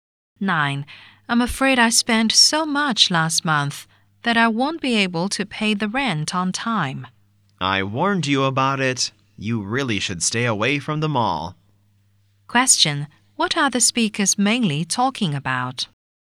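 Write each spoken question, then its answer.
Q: What are the speakers mainly talking about?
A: The man's overspending, so he can't pay the rent on time.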